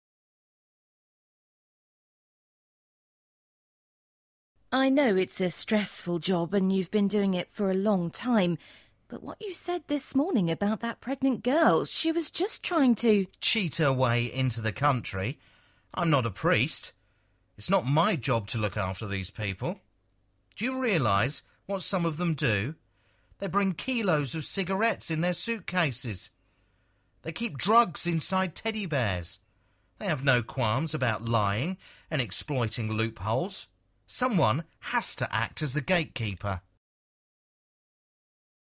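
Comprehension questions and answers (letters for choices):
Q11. What is the man's job?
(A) school teacher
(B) prison warden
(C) lawyer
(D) immigration office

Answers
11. D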